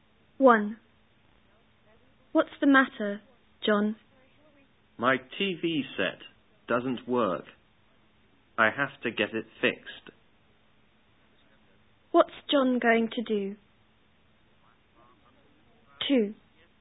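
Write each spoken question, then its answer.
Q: What's John going to do?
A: Get his TV set fixed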